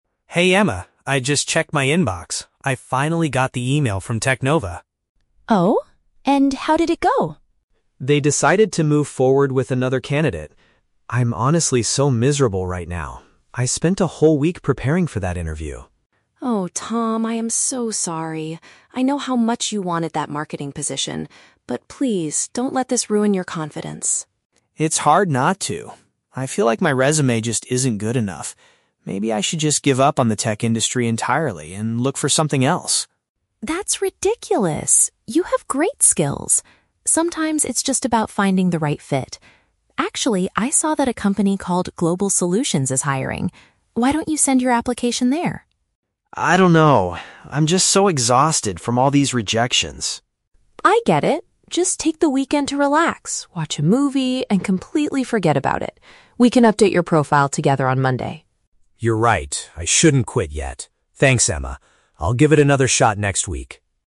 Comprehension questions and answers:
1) What news did Tom receive in his email?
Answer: His application was turned down by a technology company.

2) How does Tom react to the news initially?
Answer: He is extremely sad and considers quitting his current career path.

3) What are Tom and Emma planning to do on Monday?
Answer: Work together to improve his professional document.

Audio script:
Tom: Hey Emma... I just checked my inbox. I finally got the email from TechNova.
Emma: Oh? And? How did it go?
Tom: They decided to move forward with another candidate. I'm honestly so miserable right now. I spent a whole week preparing for that interview.
Emma: Oh, Tom, I am so sorry. I know how much you wanted that marketing position. But please, don't let this ruin your confidence.
Tom: It's hard not to. I feel like my resume just isn't good enough. Maybe I should just give up on the tech industry entirely and look for something else.
Emma: That's ridiculous! You have great skills. Sometimes it's just about finding the right fit. Actually, I saw that a company called Global Solutions is hiring. Why don't you send your application there?
Tom: I don't know... I'm just so exhausted from all these rejections.
Emma: I get it. Just take the weekend to relax, watch a movie, and completely forget about it. We can update your profile together on Monday.
Tom: You're right. I shouldn't quit yet. Thanks, Emma. I'll give it another shot next week.